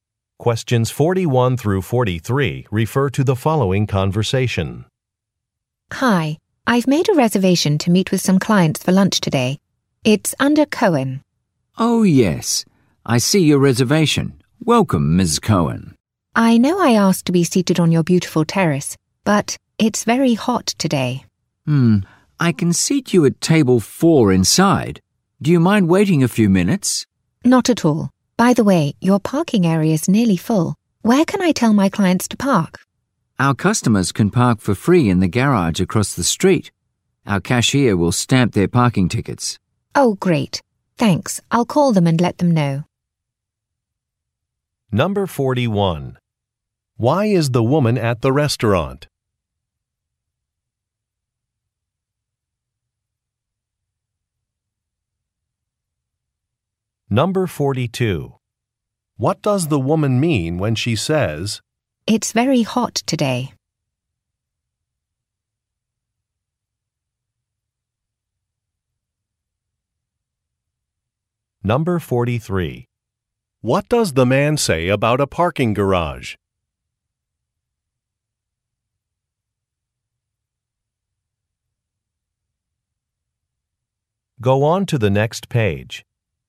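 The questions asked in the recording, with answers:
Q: Why is the woman at the restaurant?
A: To meet clients for lunch

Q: What does the woman mean when she says,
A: She wants to sit inside instead of on the terrace

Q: What does the man say about a parking garage?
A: Customers can park there for free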